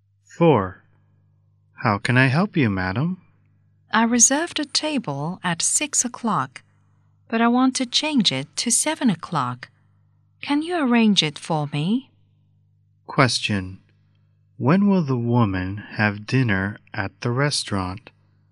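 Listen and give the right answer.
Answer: At 7 o'clock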